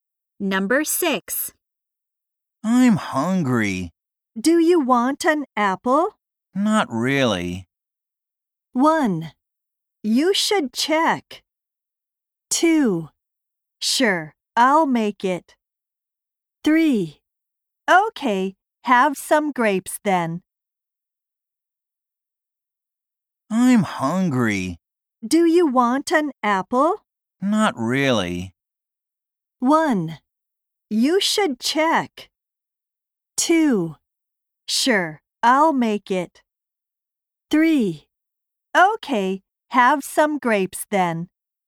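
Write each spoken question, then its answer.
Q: Not really.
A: 3: Okay, have some grapes then.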